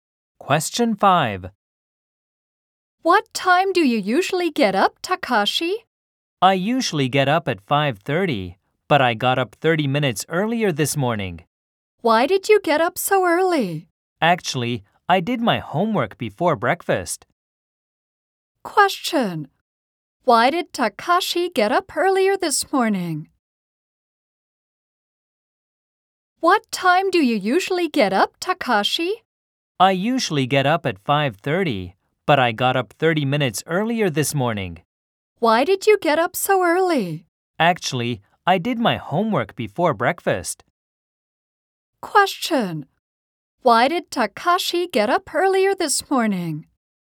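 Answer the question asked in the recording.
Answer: To do his homework before breakfast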